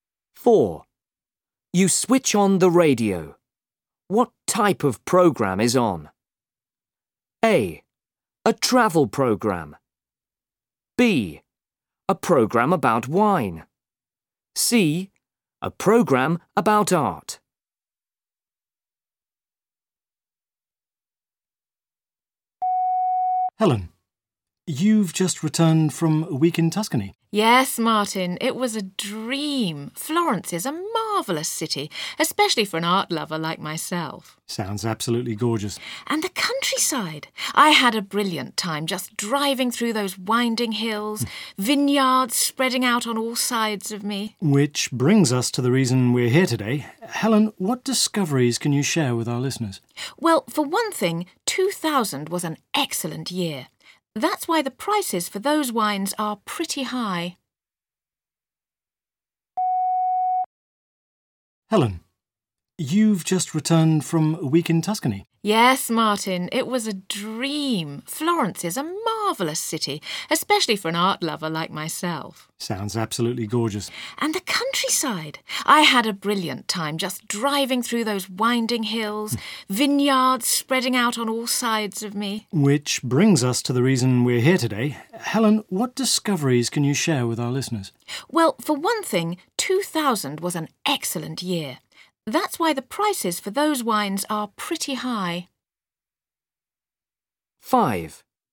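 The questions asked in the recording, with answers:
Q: What type of program is on?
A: B: A program about wine.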